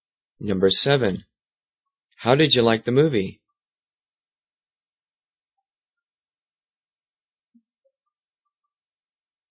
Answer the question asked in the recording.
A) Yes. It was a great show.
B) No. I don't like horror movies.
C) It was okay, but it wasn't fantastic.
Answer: C) It was okay, but it wasn't fantastic.

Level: 中级